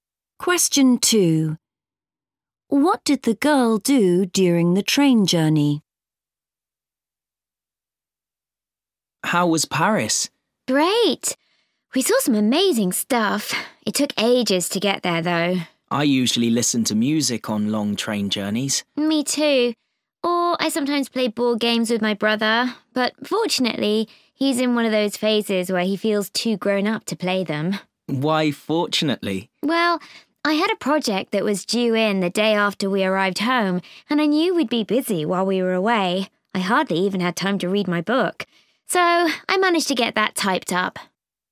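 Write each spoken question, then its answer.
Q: What did the girl do during the train journey?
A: She typed up her project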